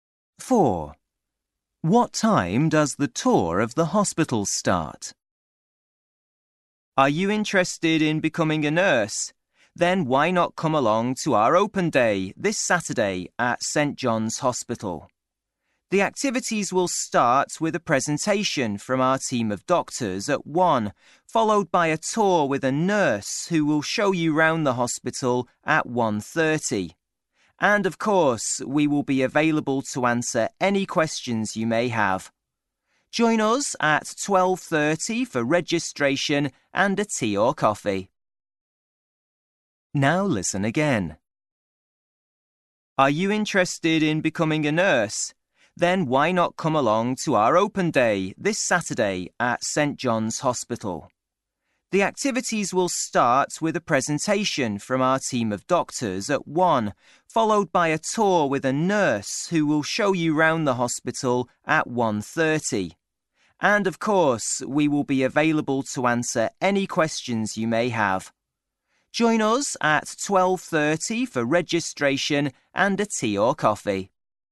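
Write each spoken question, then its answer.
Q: What time does the tour of the hospital start?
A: 1:30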